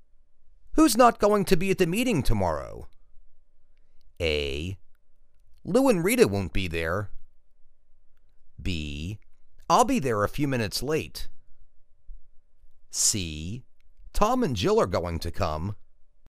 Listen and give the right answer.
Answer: Lou and Rita won't be there.